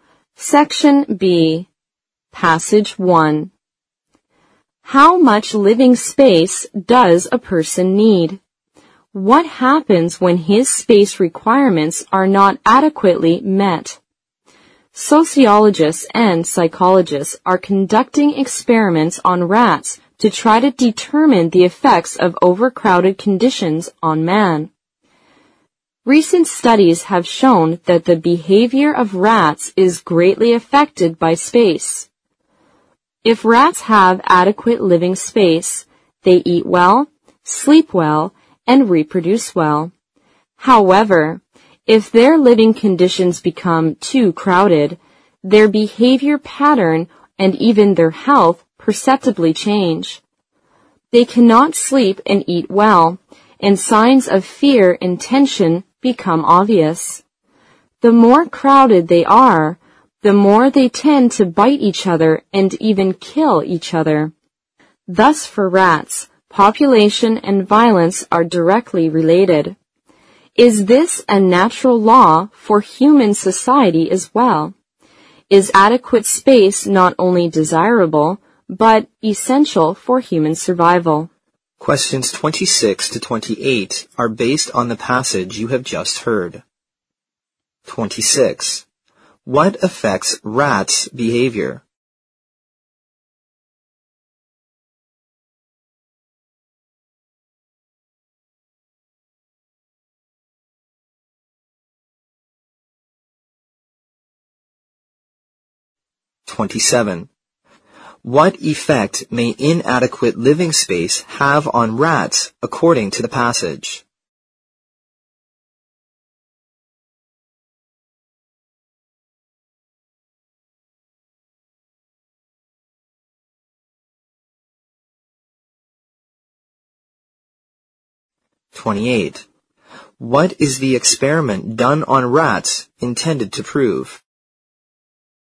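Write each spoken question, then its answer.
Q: What affects rats' behavior?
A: Living space

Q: What effect may inadequate living space have on rats according to the passage?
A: They cannot eat and sleep well, show fear and tension, and bite or even kill each other

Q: What is the experiment done on rats intended to prove?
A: The effects of overcrowded conditions on man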